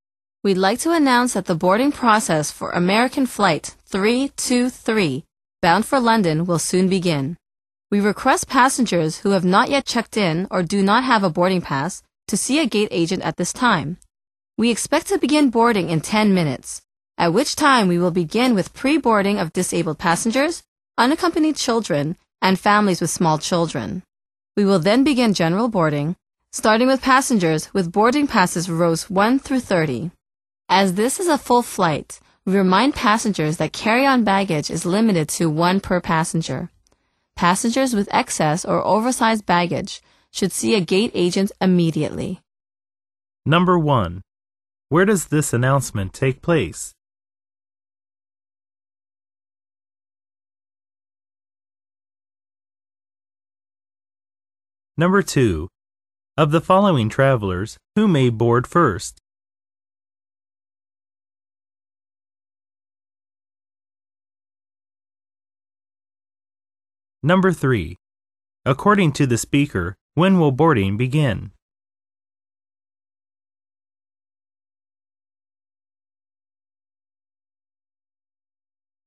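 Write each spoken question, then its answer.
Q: Where does this announcement take place?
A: At an airport boarding gate

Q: According to the speaker, when will boarding begin?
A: In 10 minutes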